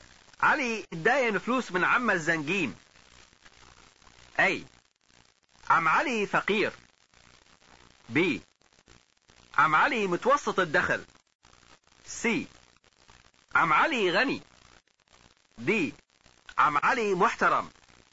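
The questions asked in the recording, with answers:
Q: علي داين فلوس من عم الزنقين.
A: س: عم علي غني.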